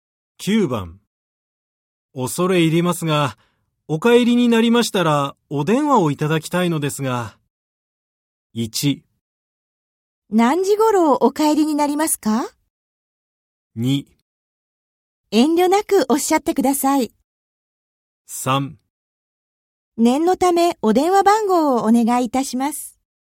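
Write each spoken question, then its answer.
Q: 恐れ入りますが、お帰りになりましたら、お電話をいただきたいのですが。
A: 3: 念のためお電話番号をお願いいたします。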